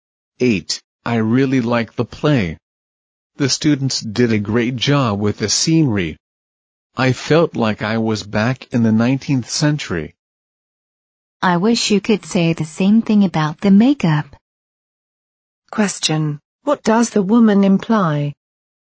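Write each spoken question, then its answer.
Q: What does the woman imply?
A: The makeup wasn't as good as the scenery.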